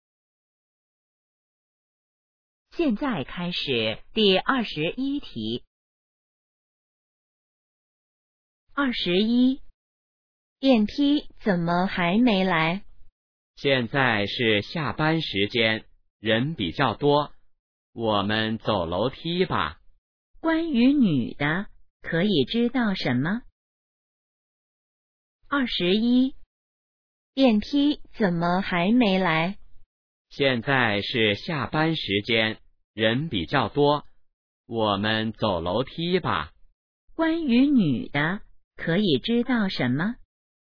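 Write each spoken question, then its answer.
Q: 关于女的,可以知道什么?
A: 她想走楼梯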